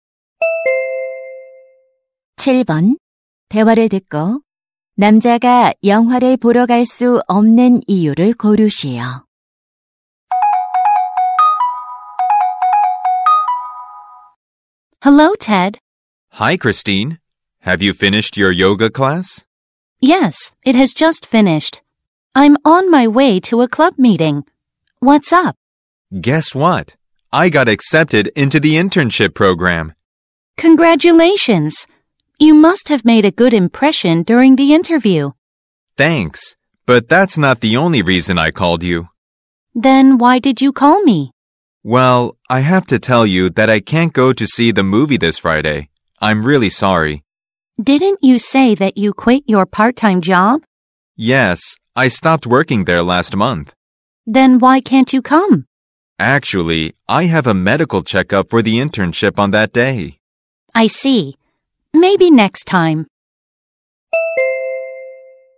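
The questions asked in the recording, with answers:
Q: 대화를 듣고 남자가 영화를 보러 갈 수 없는 이유를 고르시오.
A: 인턴십 건강 검진이 있어서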